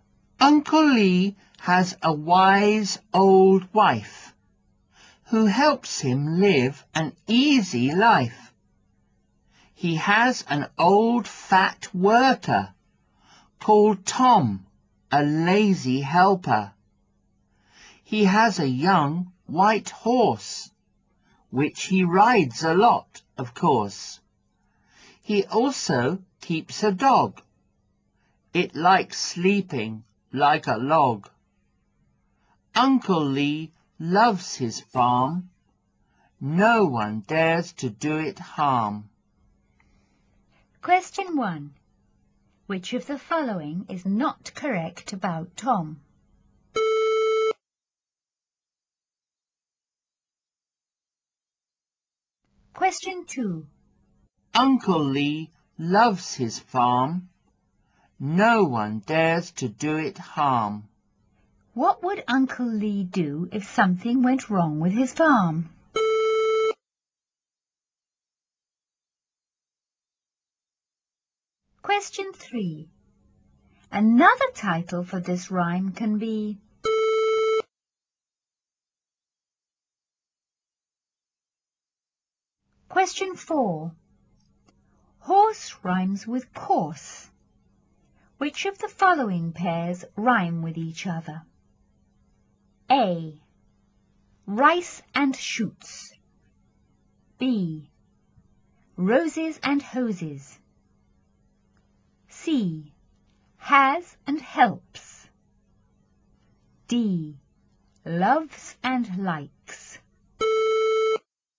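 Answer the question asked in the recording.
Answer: B: Roses and hoses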